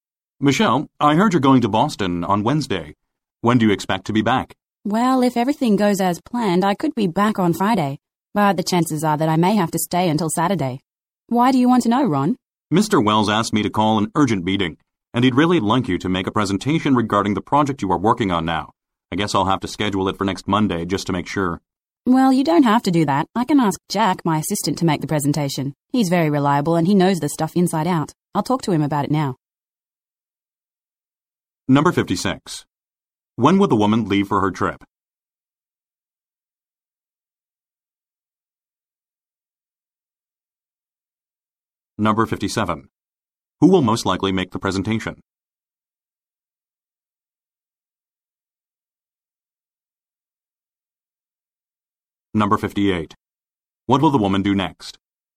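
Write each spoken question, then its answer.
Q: When would the woman leave for her trip?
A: On Wednesday

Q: Who will most likely make the presentation?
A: Jack, the woman's assistant

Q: What will the woman do next?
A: Talk to her assistant Jack about the presentation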